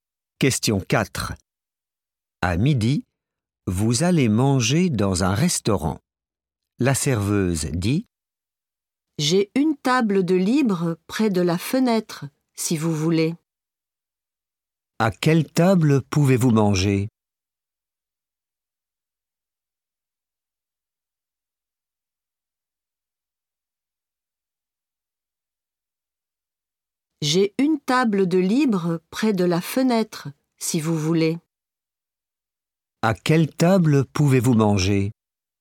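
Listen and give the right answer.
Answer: une table près de la fenêtre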